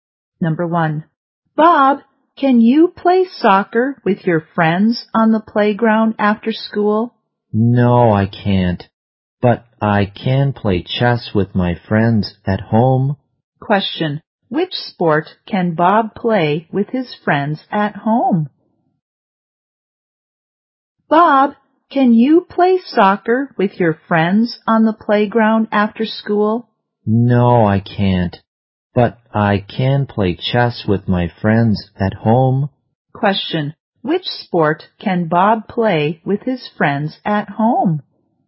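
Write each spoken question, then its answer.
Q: Which sport can Bob play with his friends at home?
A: Chess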